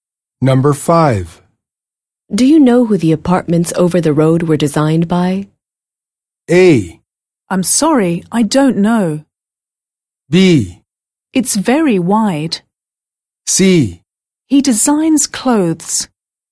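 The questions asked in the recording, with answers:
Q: Do you know who the apartments over the road were designed by?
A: A: I'm sorry, I don't know.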